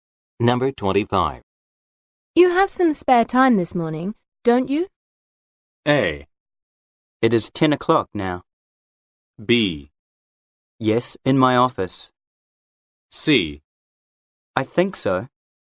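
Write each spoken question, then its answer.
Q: You have some spare time this morning, don't you?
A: C: I think so.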